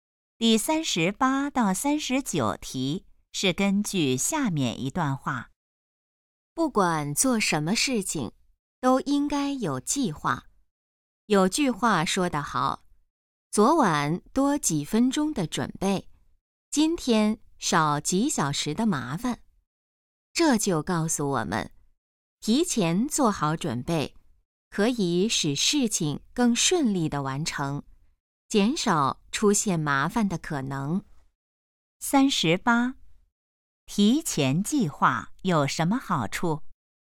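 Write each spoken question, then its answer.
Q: 提前计划有什么好处?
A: 减少麻烦,使事情更顺利

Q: 这段话主要想告诉我们什么?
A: 做事要有计划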